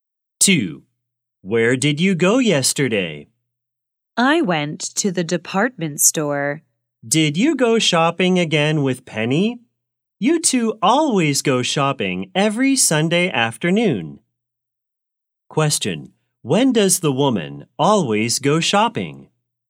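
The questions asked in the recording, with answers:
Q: When does the woman always go shopping?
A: Every Sunday afternoon.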